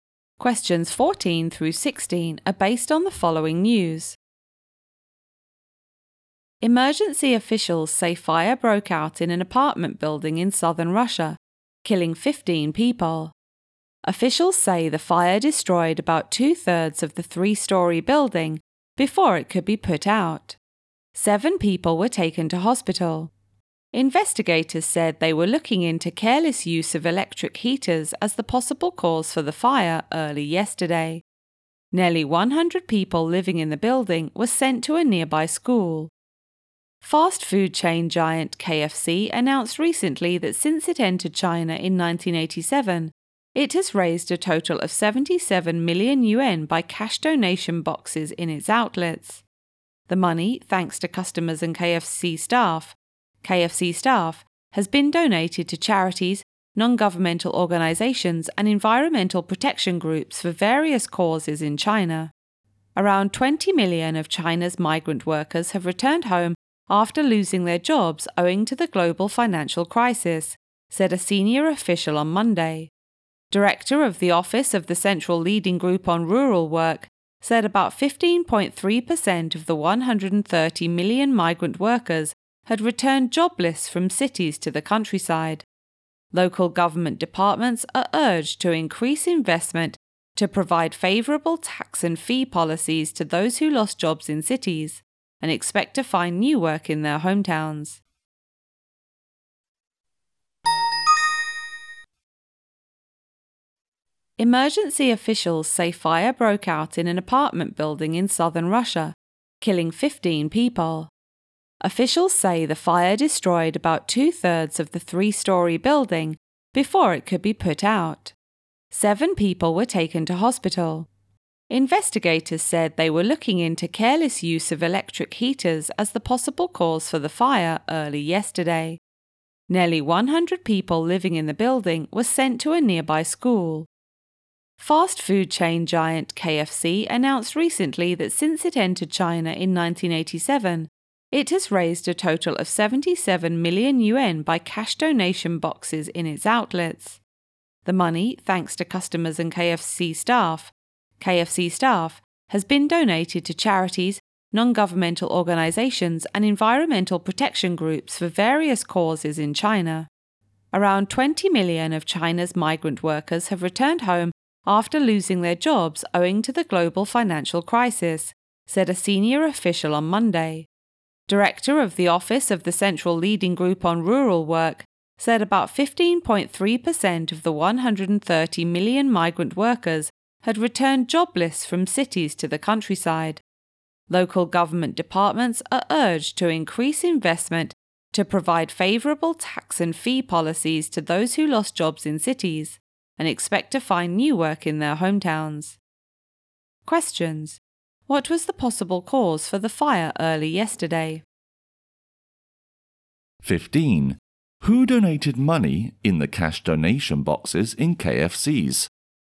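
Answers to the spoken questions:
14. Careless use of electric heaters
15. Customers and KFC staff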